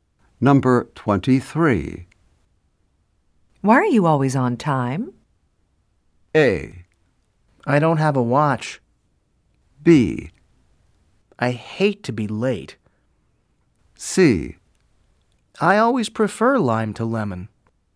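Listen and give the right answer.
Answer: B: I hate to be late.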